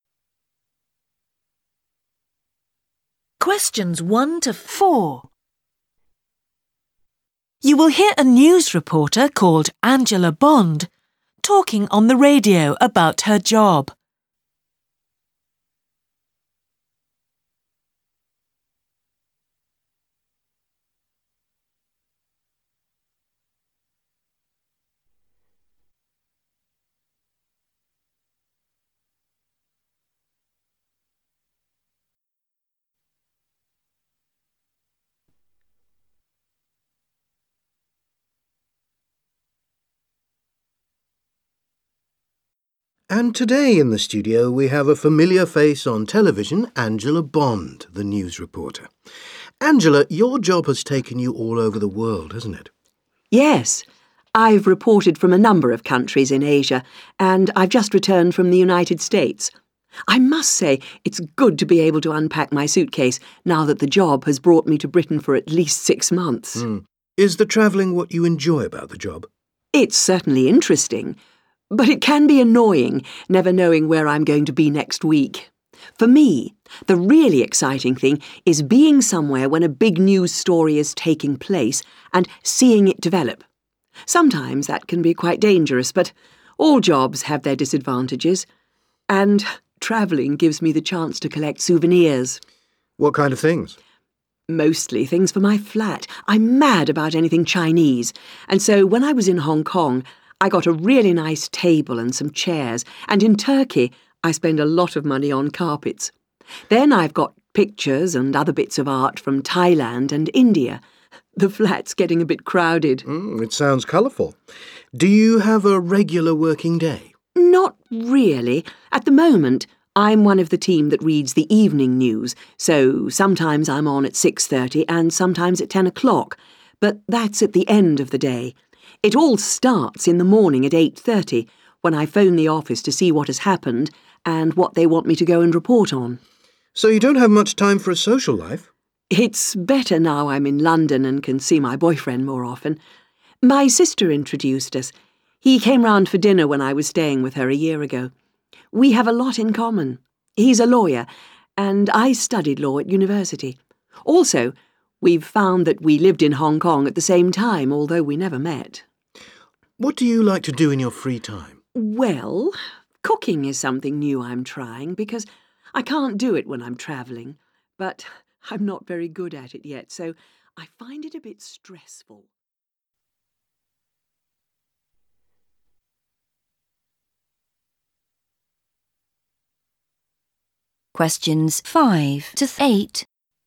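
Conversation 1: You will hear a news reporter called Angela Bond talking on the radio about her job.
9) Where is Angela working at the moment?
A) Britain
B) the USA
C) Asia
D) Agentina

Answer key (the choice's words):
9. Britain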